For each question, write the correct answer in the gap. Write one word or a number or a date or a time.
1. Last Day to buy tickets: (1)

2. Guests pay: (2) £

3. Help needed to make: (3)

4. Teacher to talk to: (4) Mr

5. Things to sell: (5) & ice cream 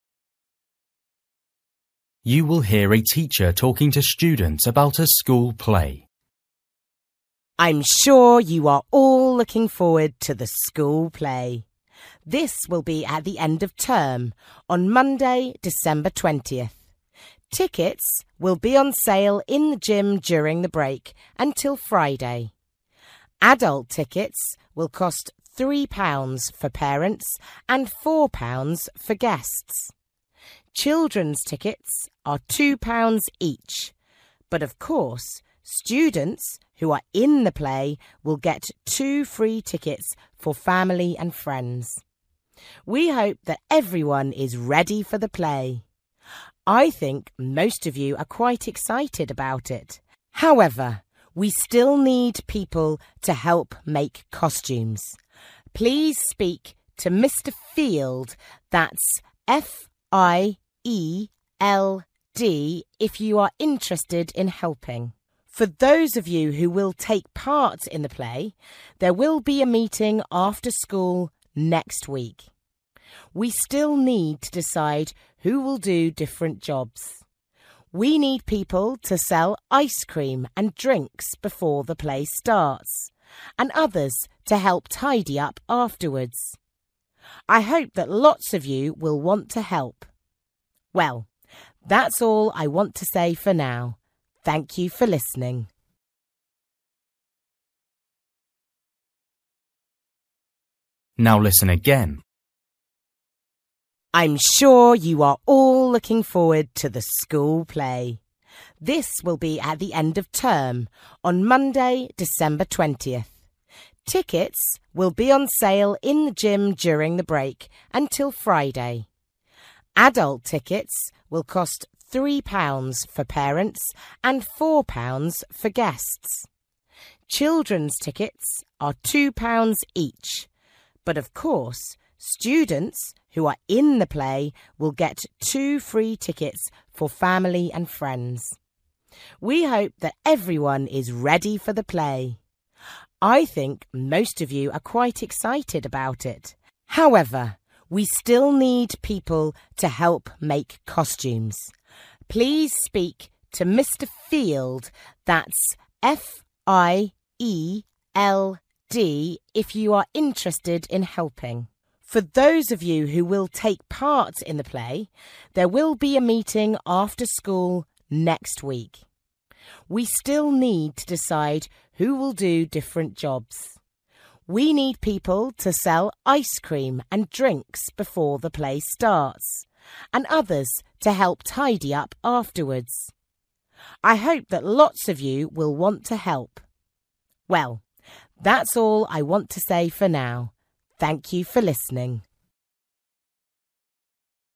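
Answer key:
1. Friday
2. 4
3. costumes
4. Field
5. drinks

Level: Luyện nghe trình độ A2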